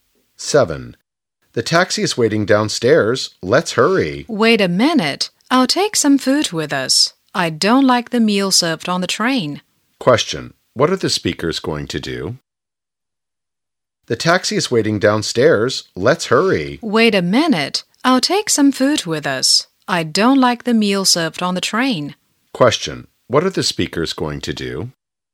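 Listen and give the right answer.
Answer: Take a train trip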